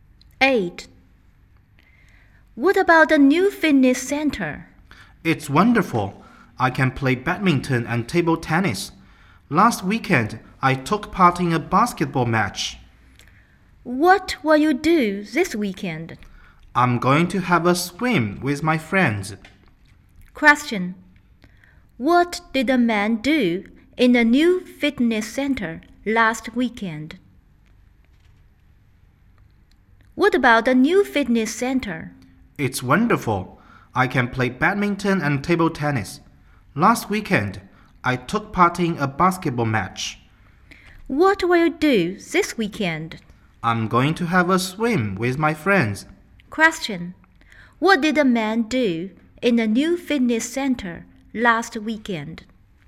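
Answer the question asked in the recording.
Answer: He took part in a basketball match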